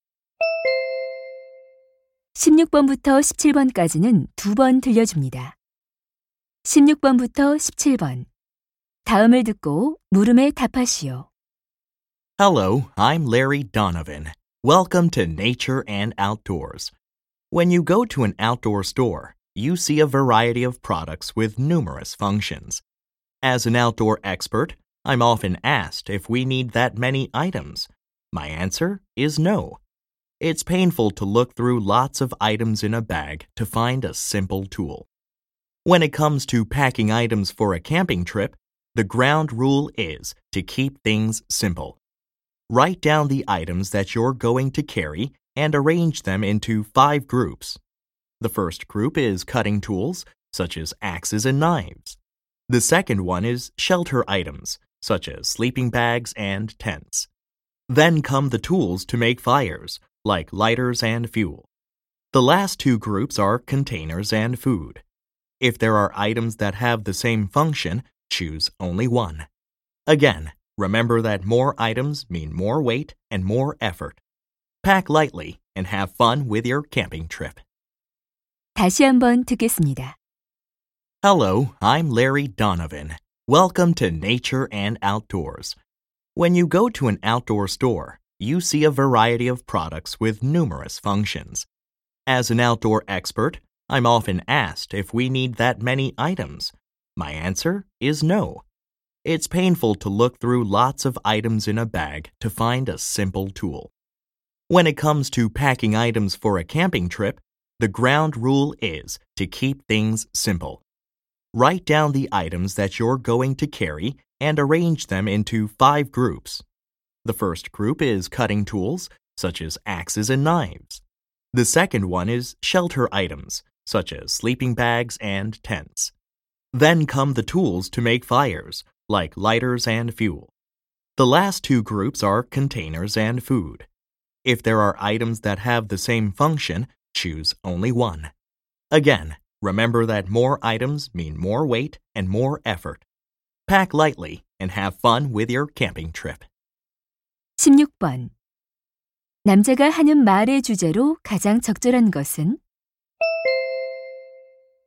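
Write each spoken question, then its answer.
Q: 남자가 하는 말의 주제로 가장 적절한 것은?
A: 캠핑 짐을 간단하게 싸는 방법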